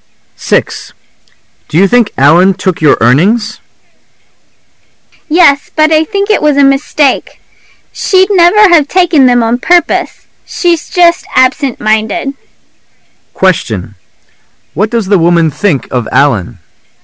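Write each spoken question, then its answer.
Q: What does the woman think of Alan?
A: She thinks Alan took them by mistake because she is absent-minded.

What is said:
W: Yes, but I think it was a mistake. She'd never have taken them on purpose. She's just absentminded. Q: What does the woman think of Allen?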